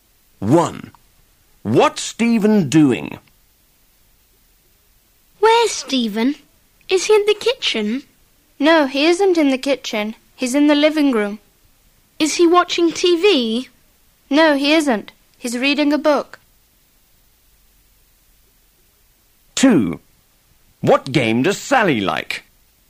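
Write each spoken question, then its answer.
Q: What's Stephen doing?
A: He's reading a book.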